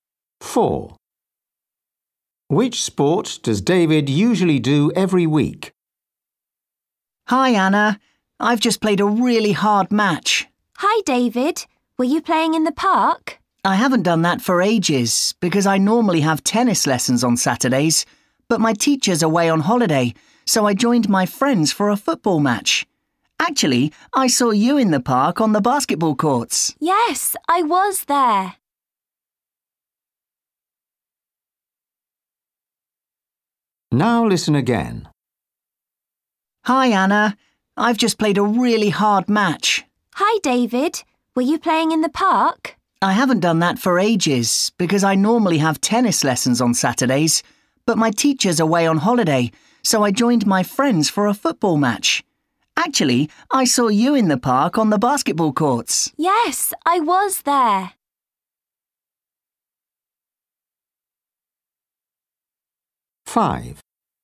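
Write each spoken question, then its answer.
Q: Which sport does David usually do every week?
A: tennis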